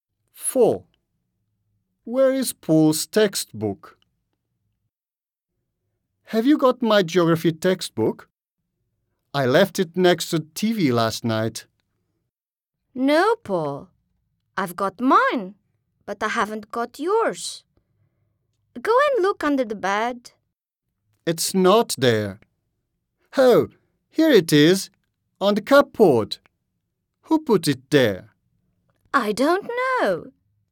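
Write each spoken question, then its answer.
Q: Where is Paul's textbook?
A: on the cupboard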